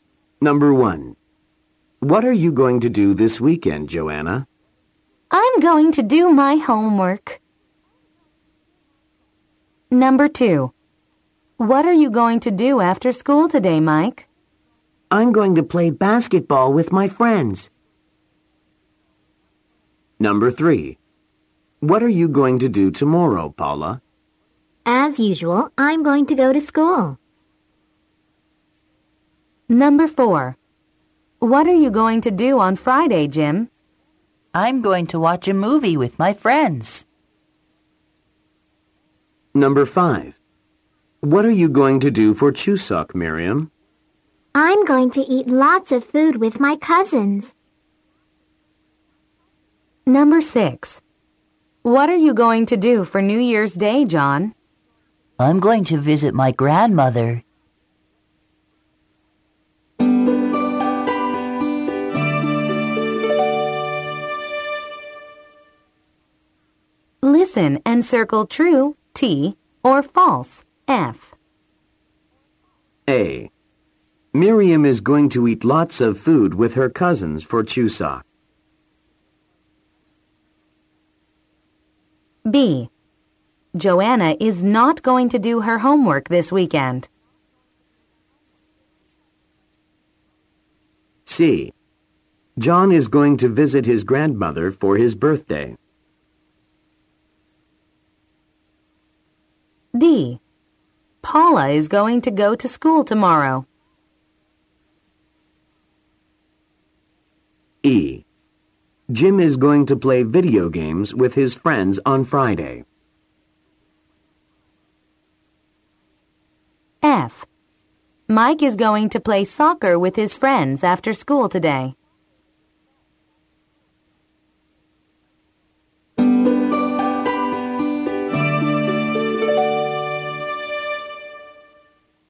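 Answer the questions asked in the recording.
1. True
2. False
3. False
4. True
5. False
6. False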